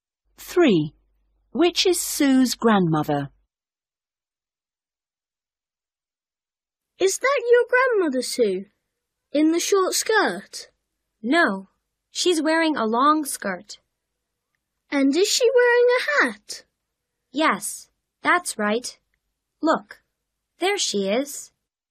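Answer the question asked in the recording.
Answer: The one in a long skirt and a hat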